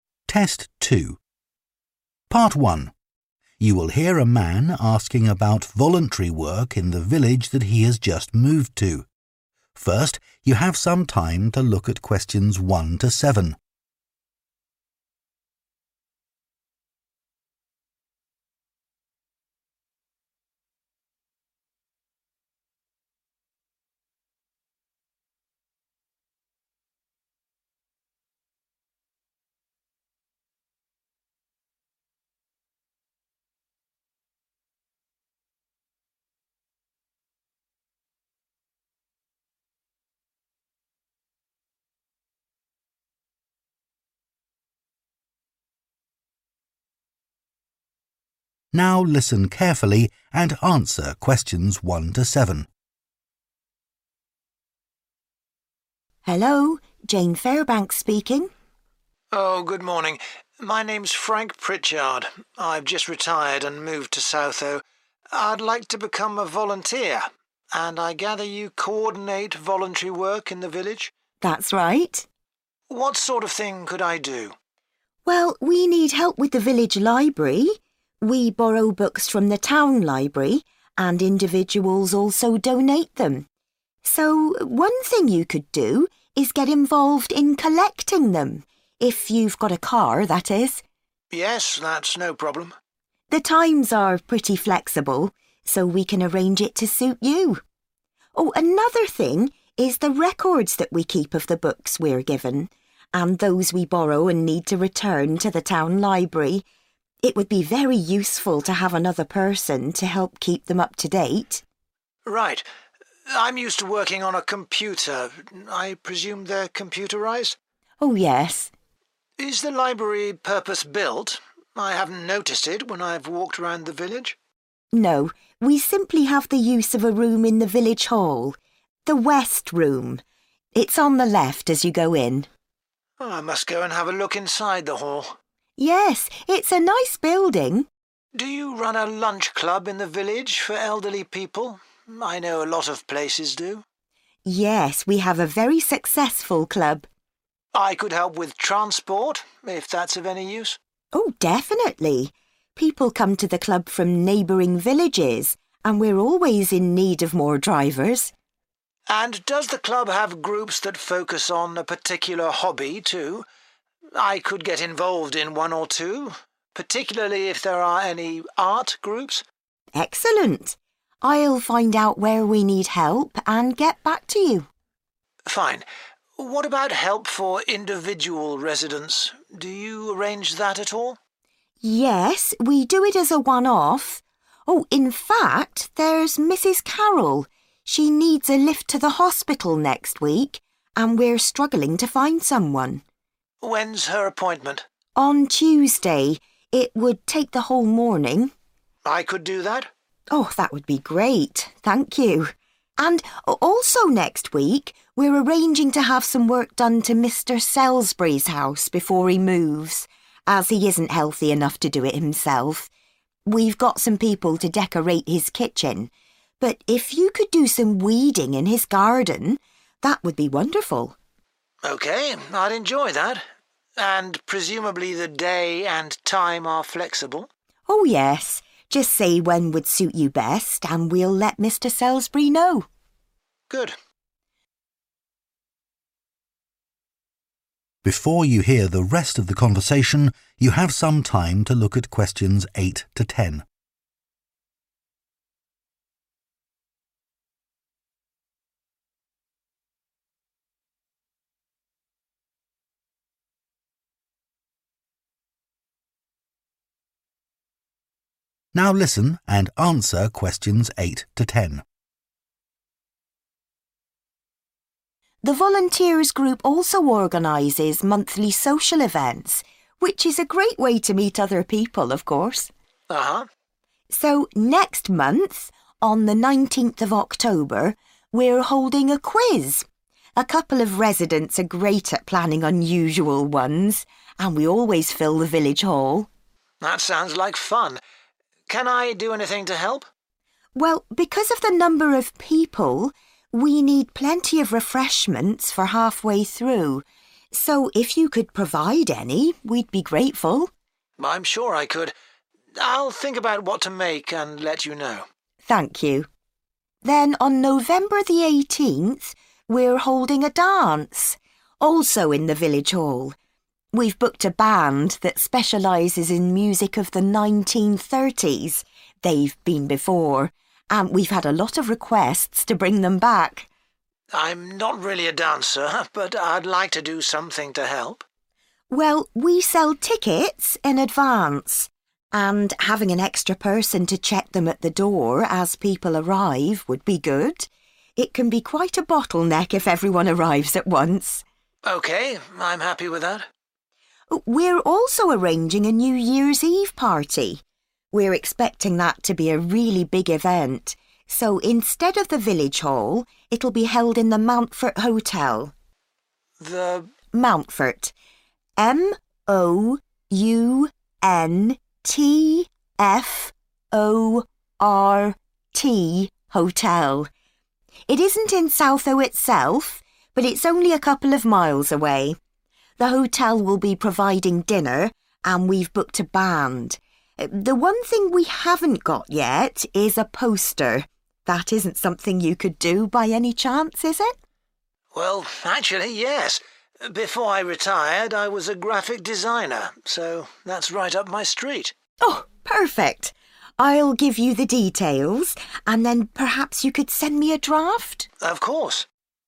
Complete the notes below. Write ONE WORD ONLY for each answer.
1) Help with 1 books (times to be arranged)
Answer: collecting

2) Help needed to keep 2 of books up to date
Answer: records

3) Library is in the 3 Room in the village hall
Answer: West

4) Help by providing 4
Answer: transport

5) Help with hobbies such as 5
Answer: art

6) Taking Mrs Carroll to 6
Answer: hospital

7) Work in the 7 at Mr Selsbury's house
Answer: garden

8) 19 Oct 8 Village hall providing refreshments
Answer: quiz

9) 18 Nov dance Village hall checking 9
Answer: tickets

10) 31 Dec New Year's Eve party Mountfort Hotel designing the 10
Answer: poster